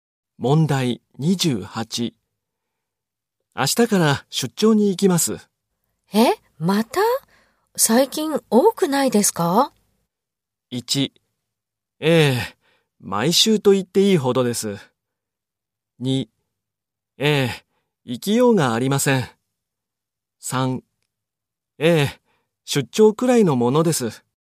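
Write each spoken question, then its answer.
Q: 明日から出張に行きます。え?また?最近多くないですか?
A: 1: ええ、毎週と言っていいほどです。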